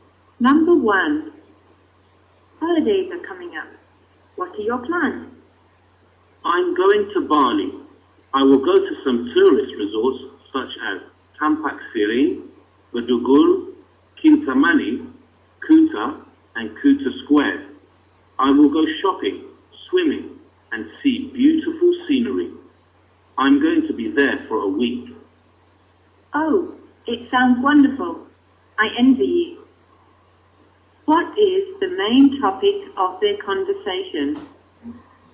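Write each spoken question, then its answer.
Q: What is the main topic of their conversation?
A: Holiday plans in Bali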